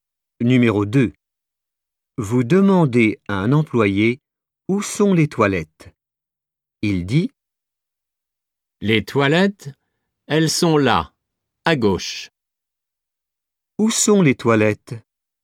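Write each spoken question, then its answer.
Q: Où sont les toilettes ?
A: là, à gauche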